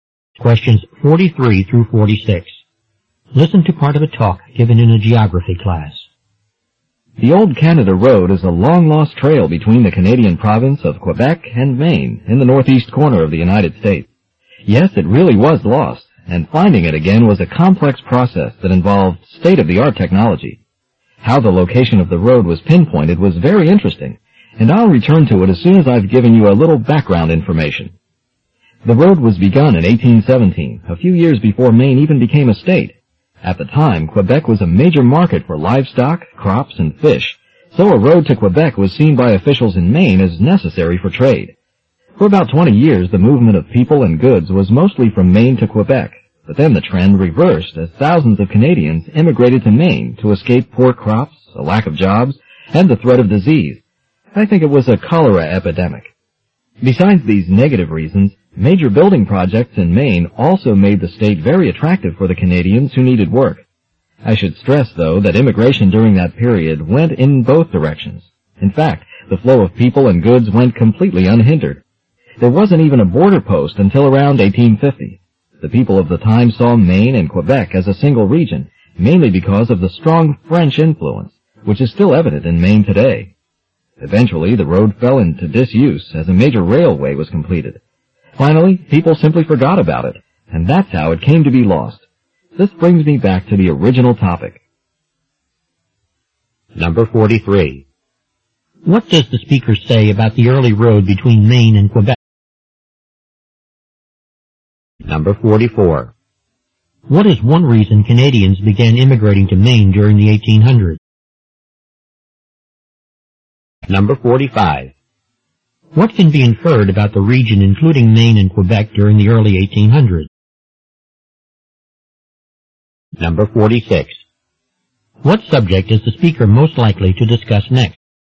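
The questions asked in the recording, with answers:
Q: What is one reason Canadians began immigrating to Maine during the 1800s?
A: To escape poor crops, a lack of jobs, and disease, or to find work on building projects

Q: What can be inferred about the region including Maine and Quebec during the early 1800s?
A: People saw it as a single region with a strong French influence.

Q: What subject is the speaker most likely to discuss next?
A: How the location of the road was found with modern technology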